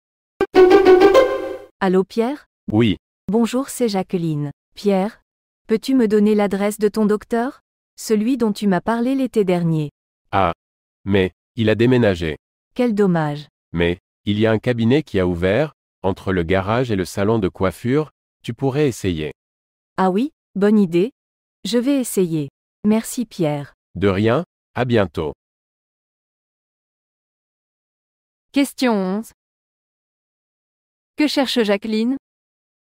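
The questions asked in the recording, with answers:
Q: Que cherche Jacqueline ?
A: L'adresse d'un docteur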